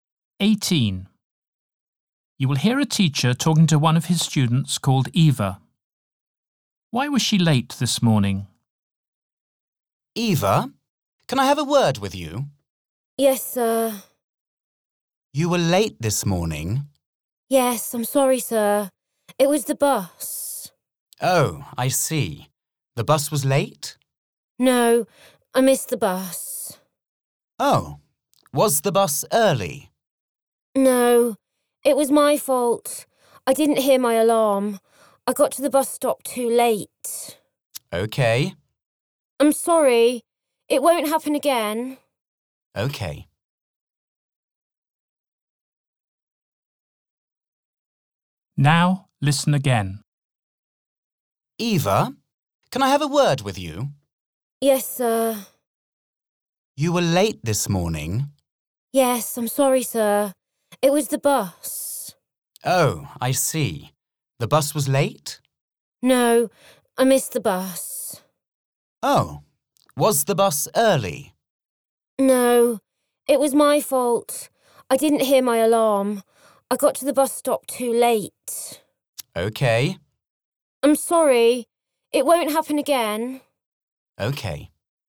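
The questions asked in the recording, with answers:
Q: Why was she late this morning?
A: She didn't hear her alarm and missed the bus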